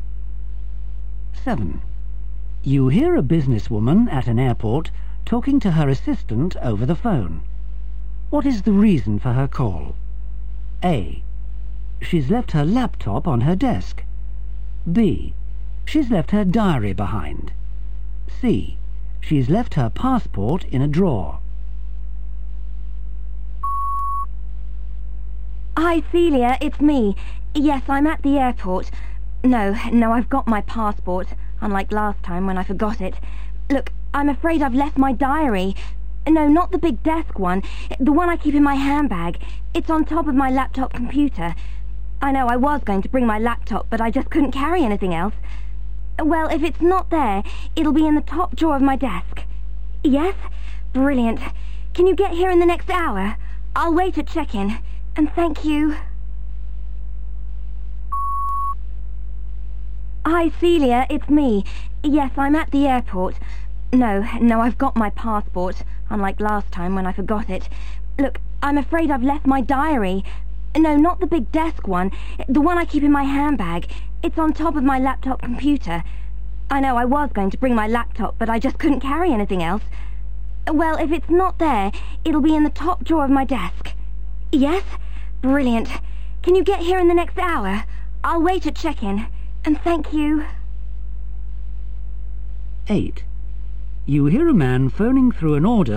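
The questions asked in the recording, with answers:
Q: What is the reason for her call?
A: B: She's left her diary behind.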